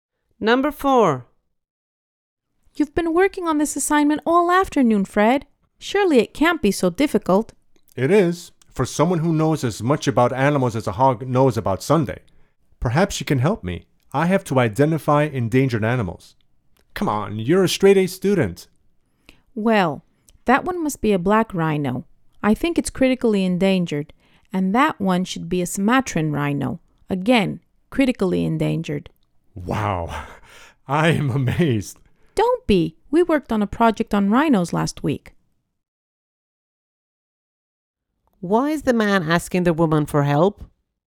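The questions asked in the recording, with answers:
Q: Why is the man asking the woman for help?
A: He knows very little about animals and has to identify endangered ones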